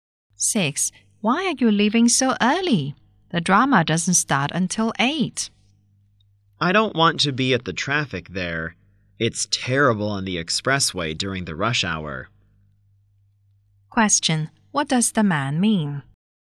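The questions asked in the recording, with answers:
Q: What does the man mean?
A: He wants to avoid the rush-hour traffic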